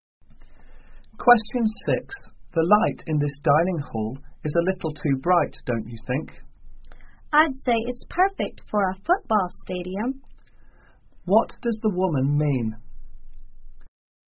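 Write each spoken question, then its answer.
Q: What does the woman mean?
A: The light is far too bright for a dining hall.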